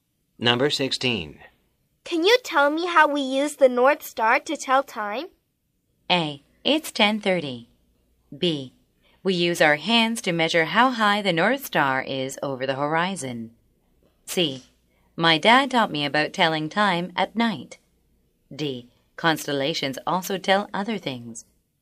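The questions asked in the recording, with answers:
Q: Can you tell me how we use the North Star to tell time?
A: B: We use our hands to measure how high the North Star is over the horizon.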